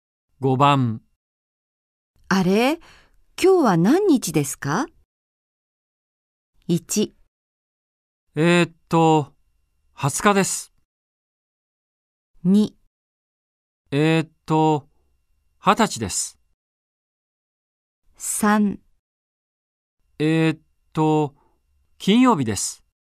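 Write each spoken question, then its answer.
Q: あれ、今日は何日ですか。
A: 1: 20日です。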